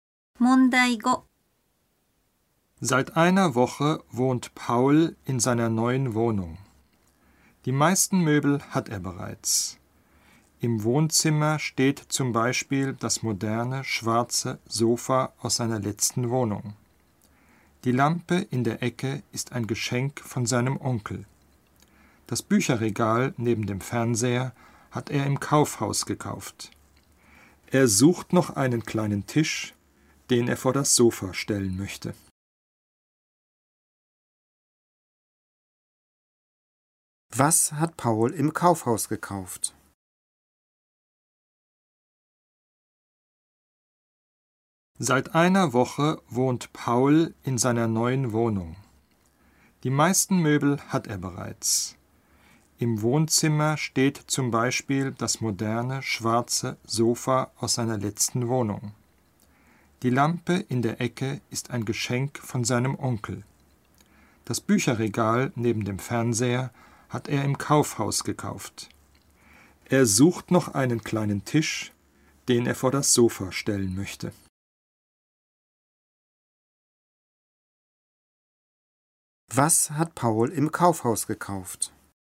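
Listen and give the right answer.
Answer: Das Bücherregal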